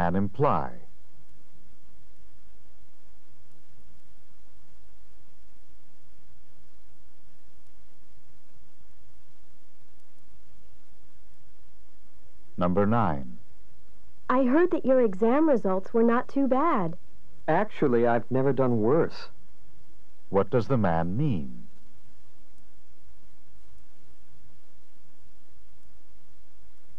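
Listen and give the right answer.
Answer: His results were the worst ever.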